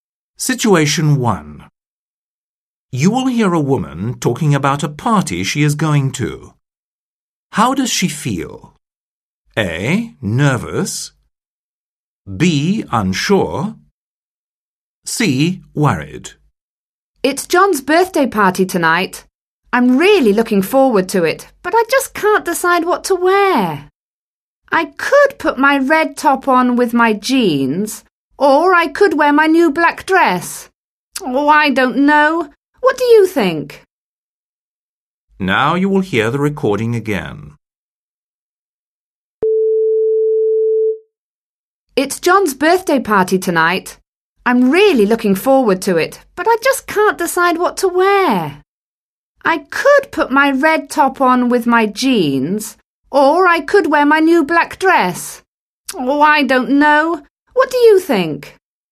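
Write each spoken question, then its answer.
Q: How does she feel?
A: B: Unsure.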